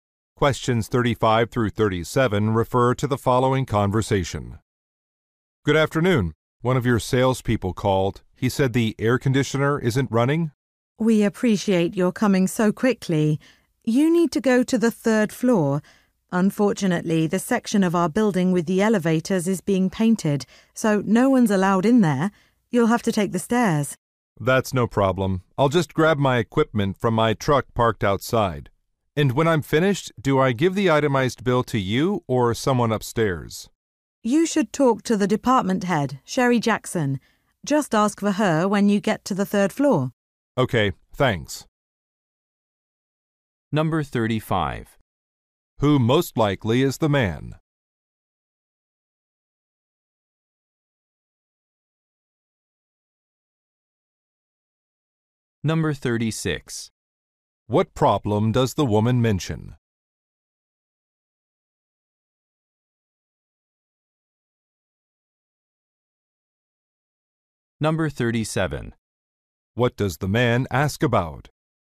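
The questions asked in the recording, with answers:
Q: Who most likely is the man?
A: An air conditioner repair technician

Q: What problem does the woman mention?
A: The elevator area is being painted, so he must take the stairs

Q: What does the man ask about?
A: Who to give the itemized bill to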